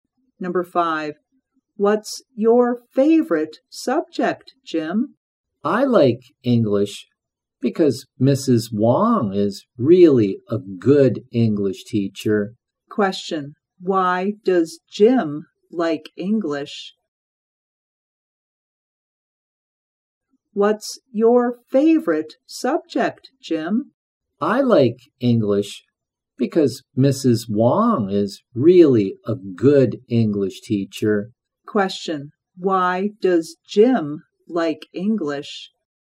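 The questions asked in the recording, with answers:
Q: why does Jim like English?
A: Mrs. Wong is a really good English teacher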